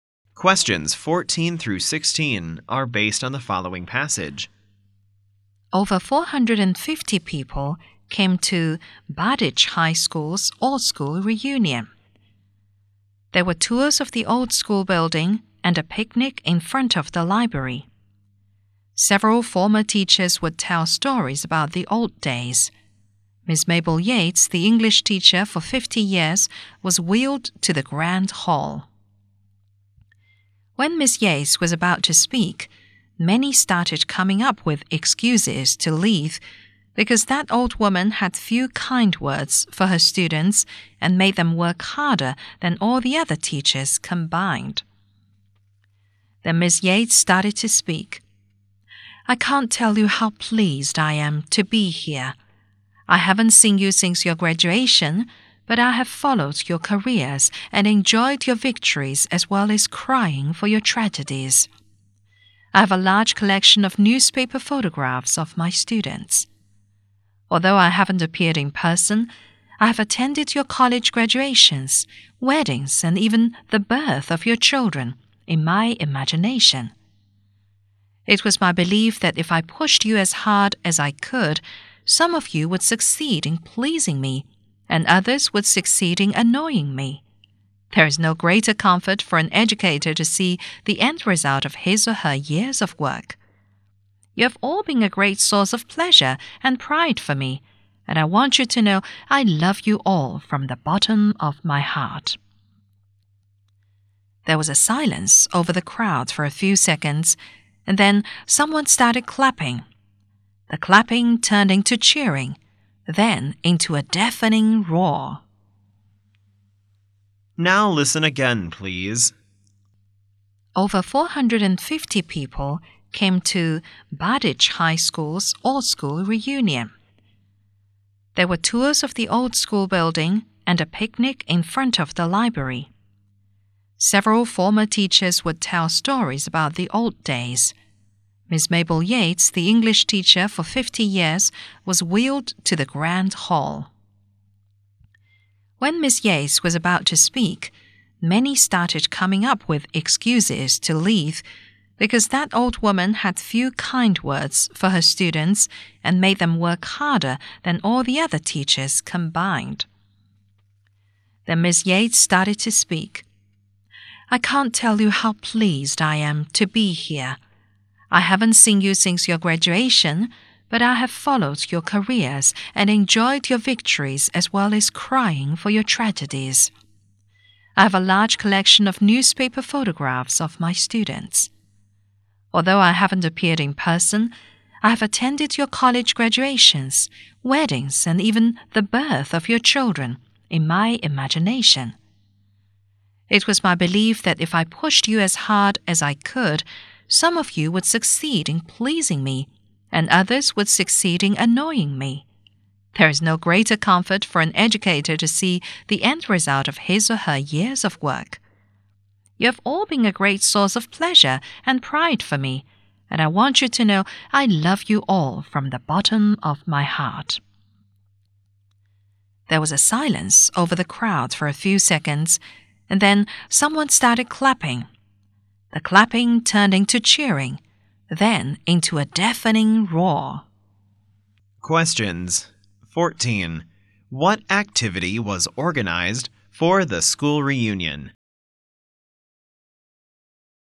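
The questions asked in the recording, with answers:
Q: Questions 14. What activity was organized for the school reunion?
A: Tours of the old school building and a picnic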